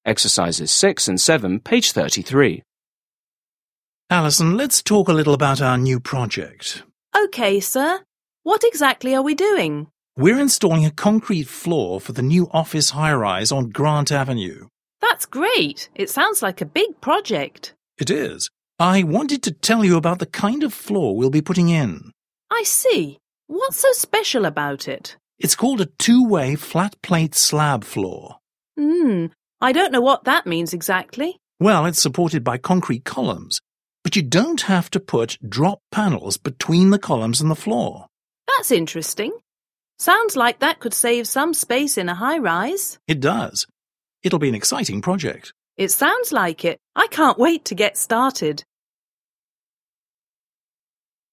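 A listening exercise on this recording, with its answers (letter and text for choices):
7. Listen again and complete the conversation.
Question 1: We're installing a concrete floor for the new 1 ___ ___ - ___ on Grant Avenue.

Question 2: 2 ___ ___! It sounds like a big project.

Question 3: It is. I wanted to tell you about the 3 ___ ___ ___ we'll be putting in.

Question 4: It's called a two-way 4 ___ ___ ___ floor.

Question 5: Hmm, I don't know 5 ___ ___ ___ exactly.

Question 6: Well, it's supported by 6 ___ ___ .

6. Listen to a conversation between a contractor and an employee. Choose the correct answers.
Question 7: What is the conversation mainly about?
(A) the concrete floor for a new project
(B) the need for a stronger concrete floor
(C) why a concrete floor is cracking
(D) how to install drop panels from concrete floors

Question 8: What is the benefit of a two-way flat plate slab floor?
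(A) It saves space.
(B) It is less expensive.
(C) It is faster to install.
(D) It is stronger than other floors.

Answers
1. office high-rise
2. That's great
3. kind of floor
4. flat plate slab
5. what that means
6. concrete columns
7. (A) the concrete floor for a new project
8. (A) It saves space.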